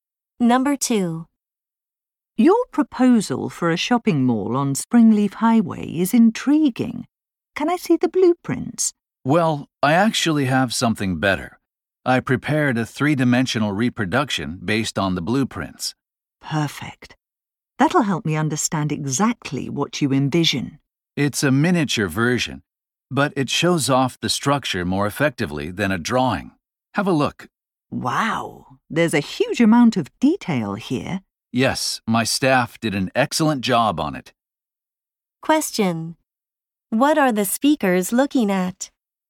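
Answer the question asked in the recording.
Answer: A 3D miniature model of a proposed shopping mall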